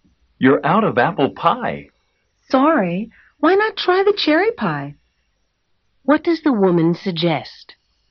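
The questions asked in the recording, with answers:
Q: What does the woman suggest?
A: Having the cherry pie instead.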